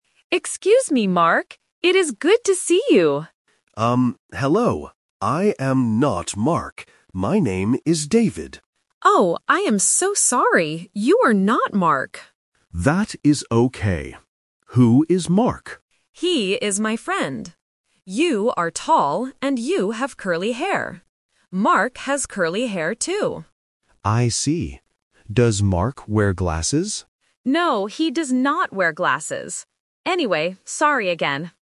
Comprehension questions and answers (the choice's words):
Listen to the conversation and choose the correct answer (A, B, or C).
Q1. Who is Mark?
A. The man's brother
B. Speaker A's friend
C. Speaker B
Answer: Speaker A's friend

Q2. What kind of hair does Speaker B (David) have?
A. Curly hair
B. Straight hair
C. Blond hair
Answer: Curly hair

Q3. Does Mark wear glasses?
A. Yes, he wears big glasses.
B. Yes, he wears sunglasses.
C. No, he does not wear glasses.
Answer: No, he does not wear glasses.

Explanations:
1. Speaker A explicitly says, "He is my friend."
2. Speaker A tells Speaker B, "You are tall and you have curly hair."
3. Speaker B asks if Mark wears glasses, and Speaker A answers, "No, he does not wear glasses."